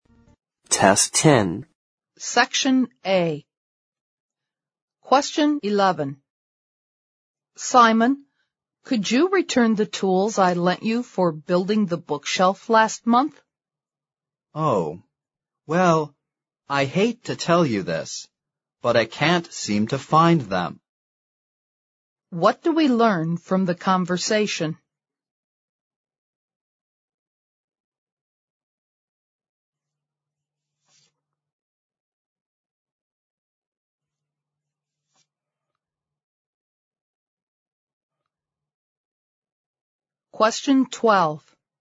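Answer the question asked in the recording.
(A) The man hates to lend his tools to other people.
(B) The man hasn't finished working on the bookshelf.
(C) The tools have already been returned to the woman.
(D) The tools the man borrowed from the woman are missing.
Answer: (D) The tools the man borrowed from the woman are missing.

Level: 四级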